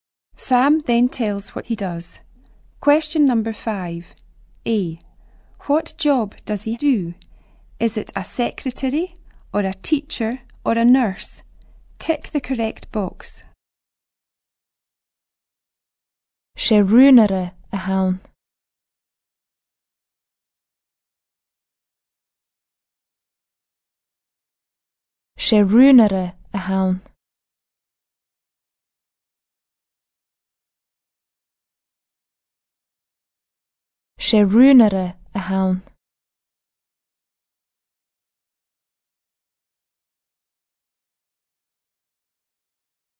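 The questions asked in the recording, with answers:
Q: What job does he do?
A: A secretary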